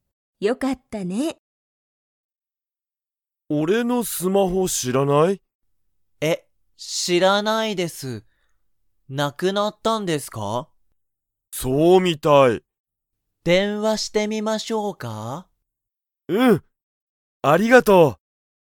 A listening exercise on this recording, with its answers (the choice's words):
Comprehension Quiz (Skip if you don't understand the conversation yet)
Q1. 鈴木(すずき)さんは、佐藤(さとう)さんに電話(でんわ)してみますか?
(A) はい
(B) いいえ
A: はい

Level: Level 1